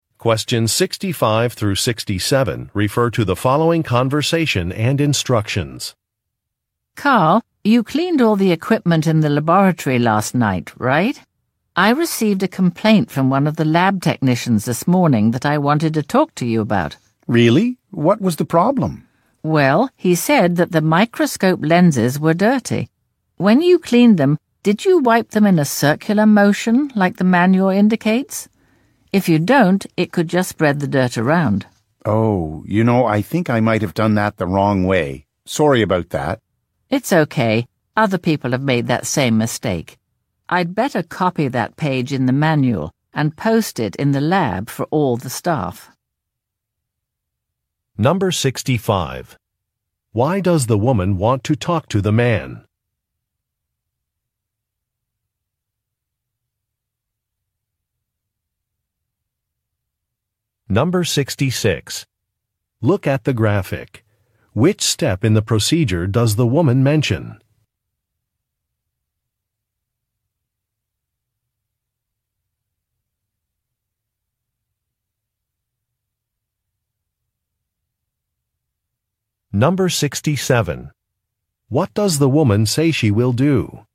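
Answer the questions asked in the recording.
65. A lab technician complained that the microscope lenses were dirty after he cleaned them.
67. Copy a page of the manual and post it in the lab for all the staff.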